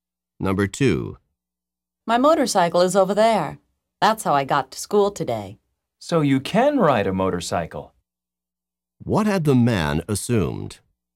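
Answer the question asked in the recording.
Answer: The woman could not ride a motorcycle.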